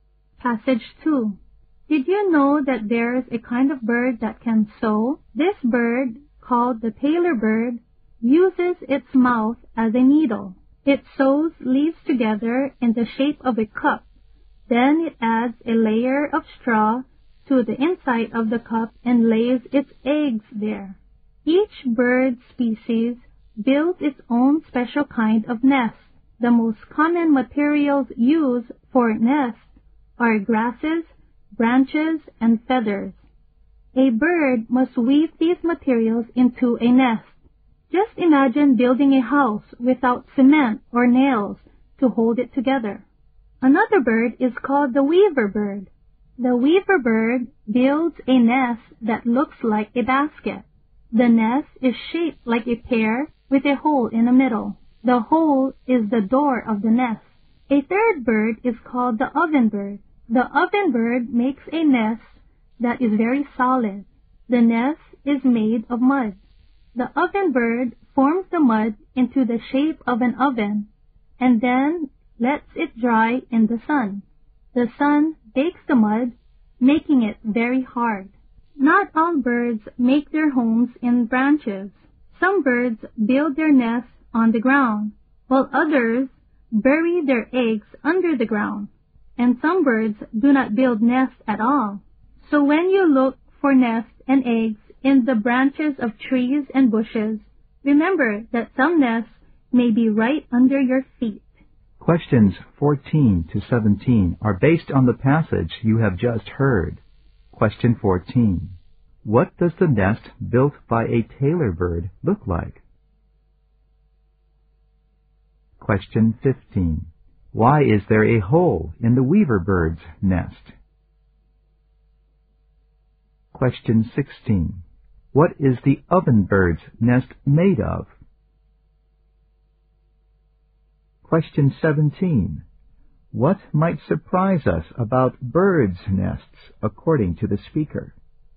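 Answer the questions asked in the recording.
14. A cup
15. It serves as the door
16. Mud
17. Some nests may be on or under the ground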